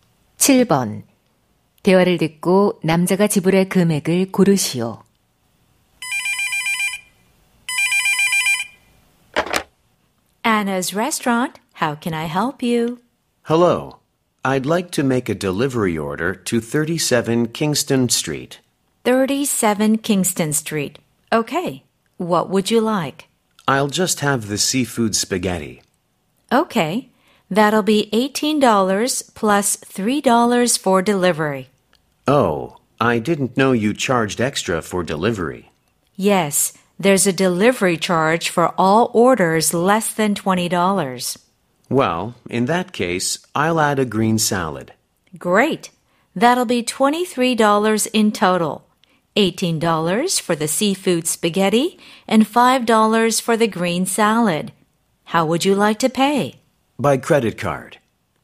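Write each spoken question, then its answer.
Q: 대화를 듣고 남자가 지불할 금액을 고르시오.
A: $23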